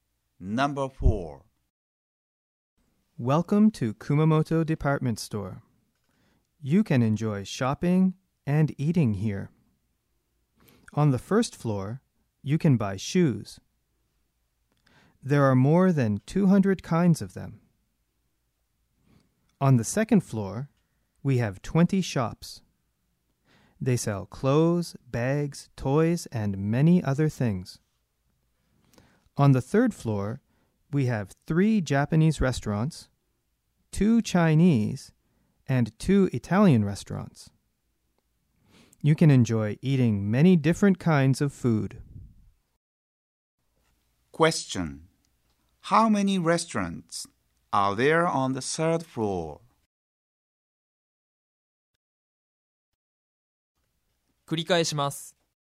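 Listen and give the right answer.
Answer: Seven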